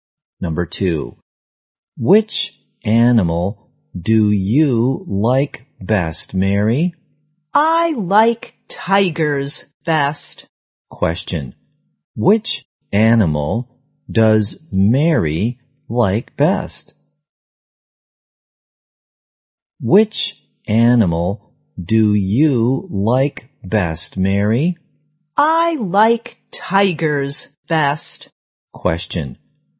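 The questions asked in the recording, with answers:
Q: which animal does Mary like best?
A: Tigers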